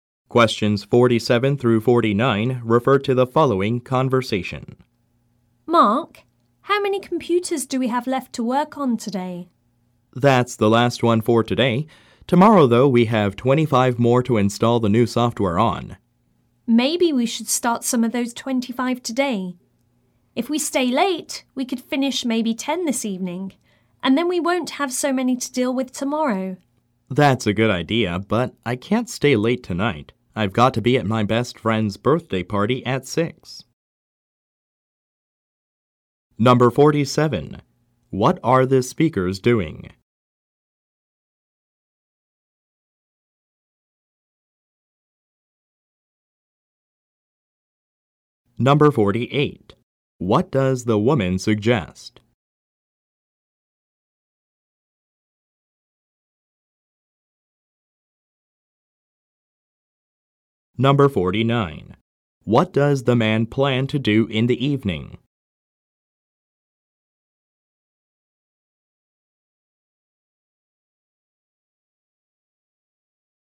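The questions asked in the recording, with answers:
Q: What are the speakers doing?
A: Installing new software on computers

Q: What does the woman suggest?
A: Staying late to start some of the 25 computers today

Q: What does the man plan to do in the evening?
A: Go to his best friend's birthday party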